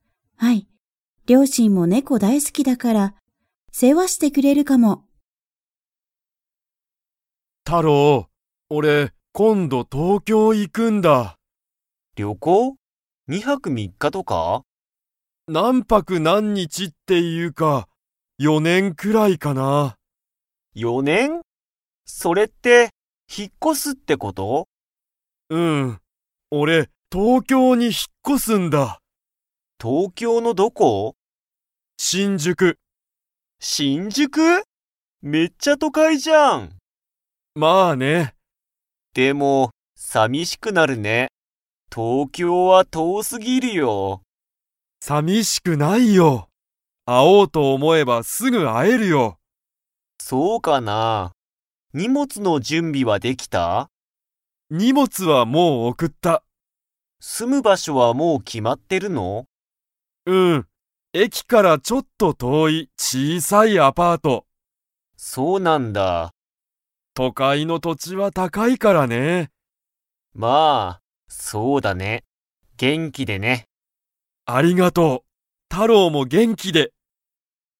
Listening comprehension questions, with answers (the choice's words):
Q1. ツヨシはどこに引ひっ越こしますか?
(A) 東京とうきょう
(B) 京都きょうと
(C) アメリカ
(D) 横浜よこはま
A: 東京とうきょう

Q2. ツヨシは、住すむ場所ばしょが 。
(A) 決きまってる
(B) 決きまってない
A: 決きまってる

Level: Level 4